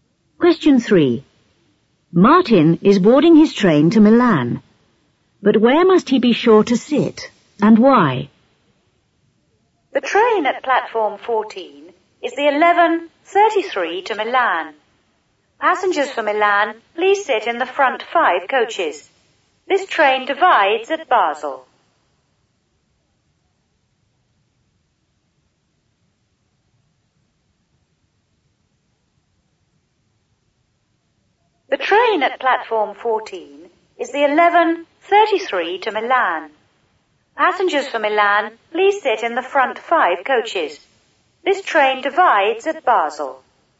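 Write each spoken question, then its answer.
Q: But where must he be sure to sit, and why?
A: In the front 5 coaches, because the train divides at Basel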